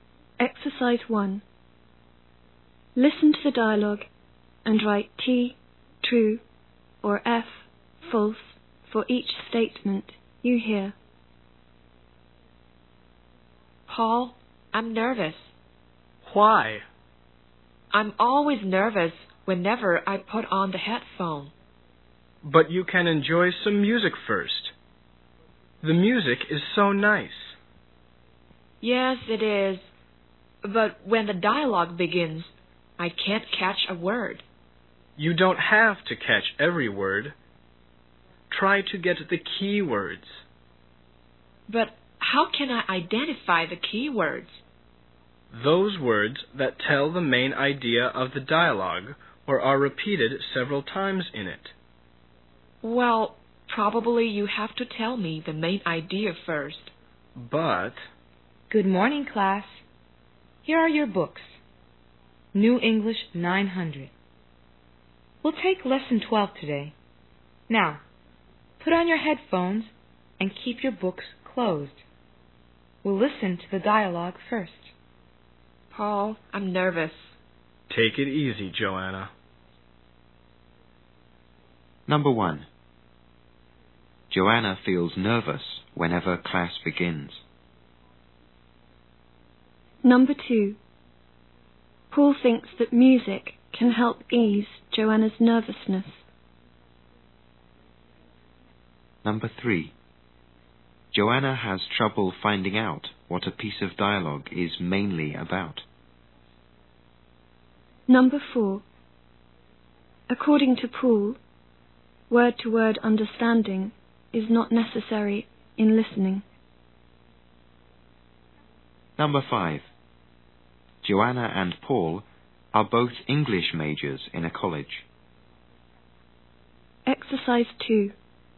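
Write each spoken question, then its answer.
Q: Joanna feels nervous whenever class begins.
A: False

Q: Paul thinks that music can help ease Joanna's nervousness.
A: True

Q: According to Paul, word-to-word understanding is not necessary in listening.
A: True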